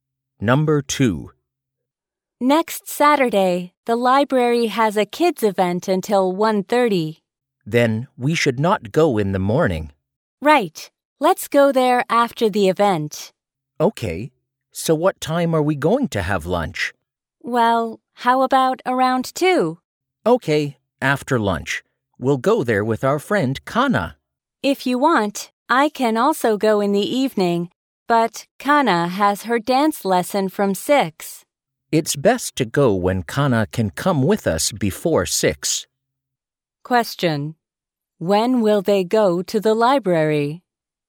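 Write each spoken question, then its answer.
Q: When will they go to the library?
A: Next Saturday after lunch (after 2), before 6, with Kana.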